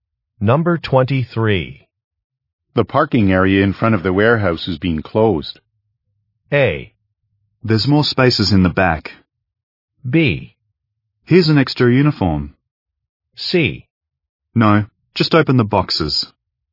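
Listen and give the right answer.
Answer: A: There's more spaces in the back.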